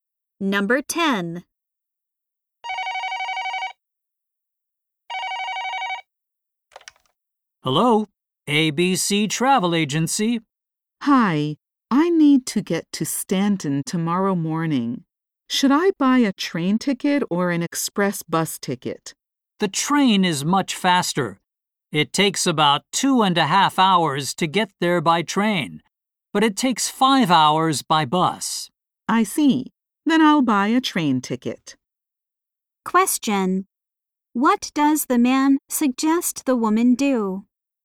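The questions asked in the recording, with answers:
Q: What does the man suggest the woman do?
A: Take the train.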